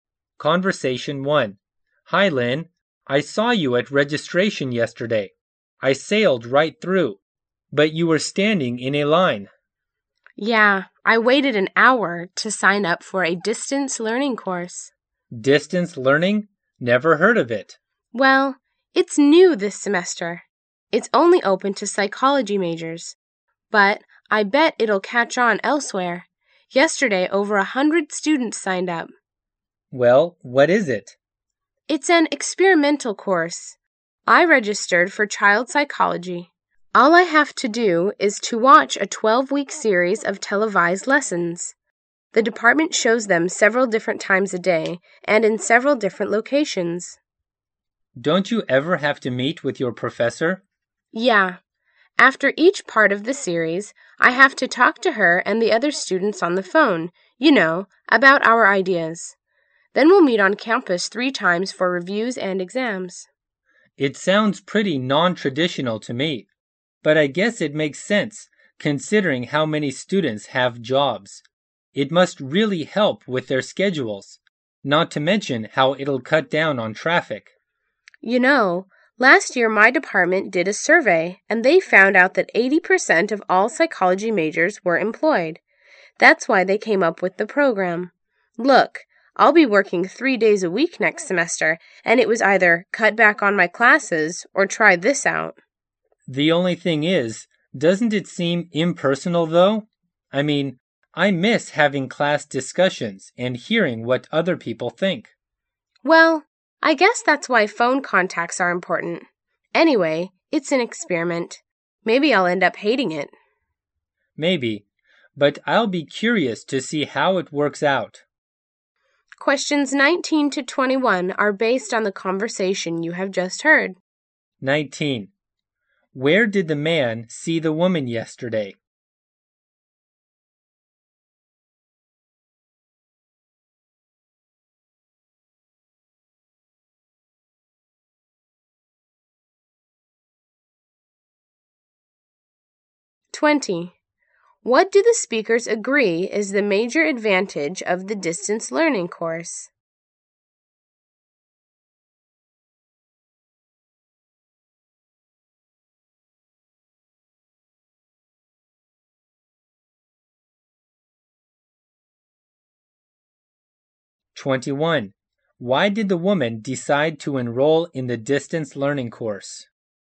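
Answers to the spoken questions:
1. At registration
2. It fits the schedules of students who have jobs
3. She will be working three days a week next semester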